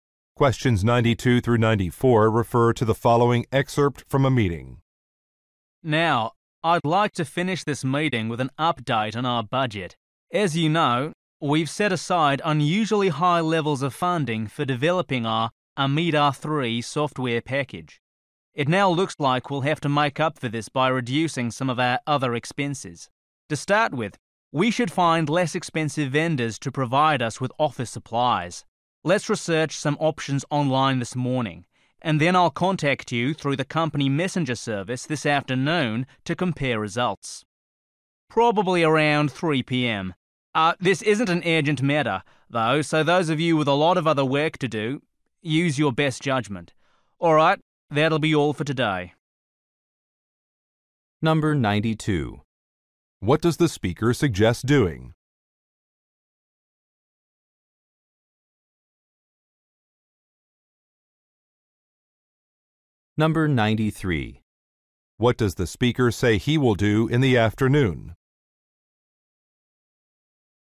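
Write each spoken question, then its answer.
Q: What does the speaker suggest doing?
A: Finding less expensive office supply vendors

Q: What does the speaker say he will do in the afternoon?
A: Contact them through the company messenger service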